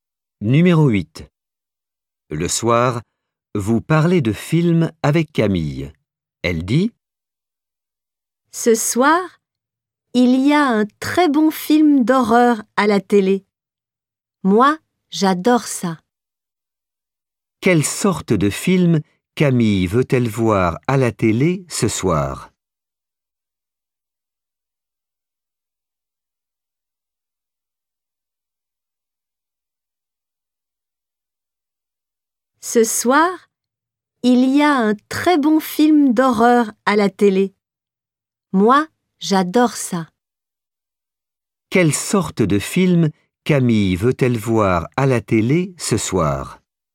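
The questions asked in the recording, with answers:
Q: Quelle sorte de film Camille veut-elle voir à la télé ce soir?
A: Un film d'horreur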